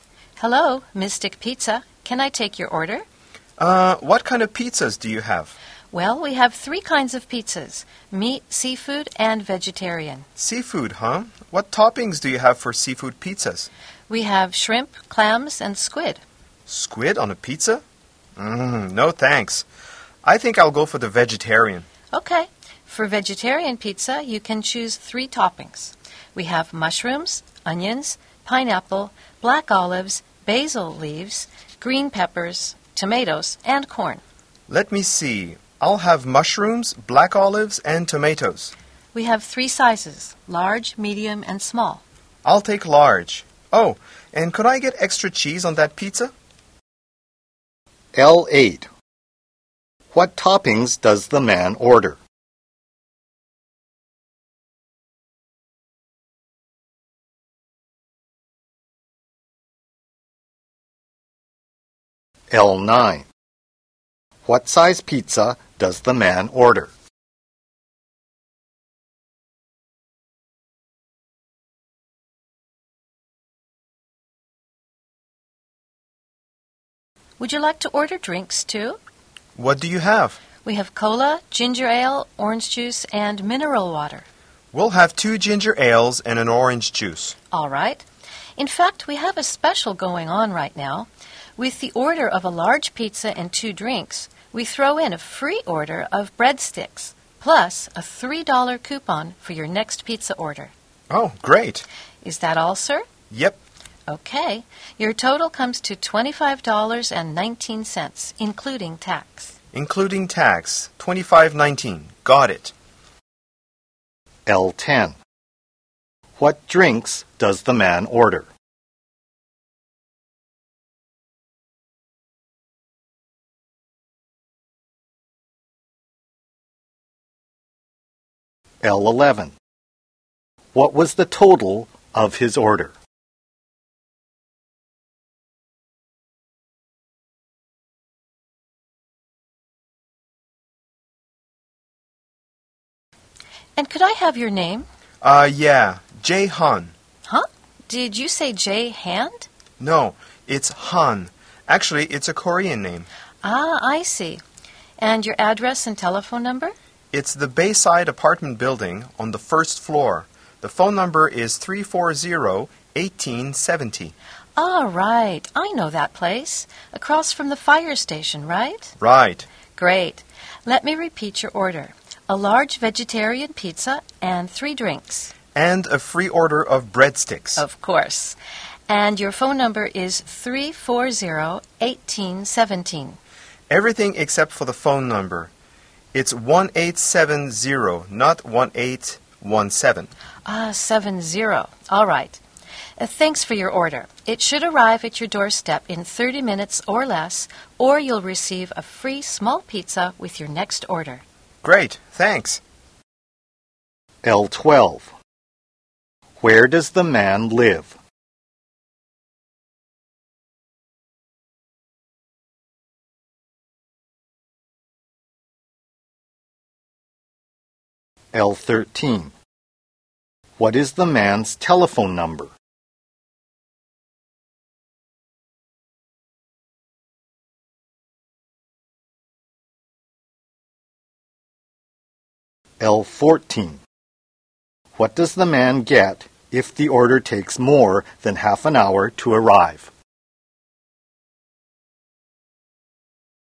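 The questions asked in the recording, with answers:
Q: What toppings does the man order?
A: Mushrooms, black olives and tomatoes (plus extra cheese)

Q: What size pizza...Does the man order?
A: Large

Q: What drinks does the man order?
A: Two ginger ales and an orange juice

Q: What was the total of his order?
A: $25.19, including tax

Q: Where does the man live?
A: On the first floor of the Bayside apartment building, across from the fire station

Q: What is the man's telephone number?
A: 340-1870

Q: What does the man get if the order takes more than half an hour to arrive?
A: A free small pizza with his next order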